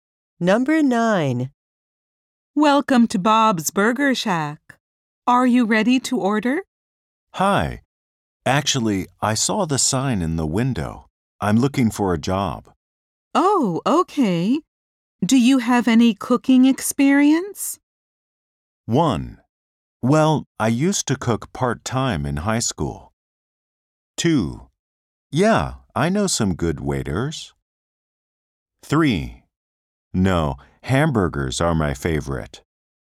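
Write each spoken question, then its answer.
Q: Oh, okay. Do you have any cooking experience?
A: 1: Well, I used to cook part-time in high school.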